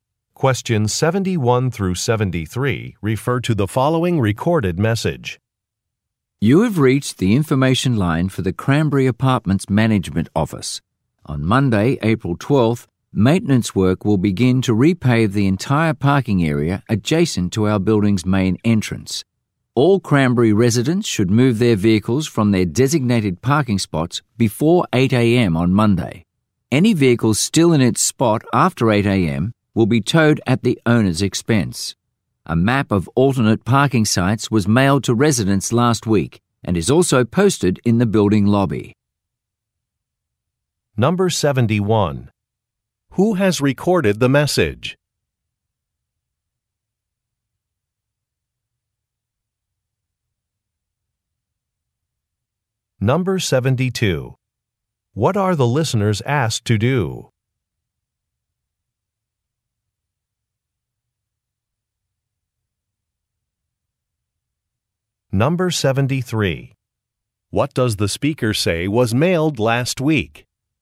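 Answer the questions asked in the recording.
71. The Cranberry Apartments management office
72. Move their vehicles before 8 a.m. on Monday
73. A map of alternate parking sites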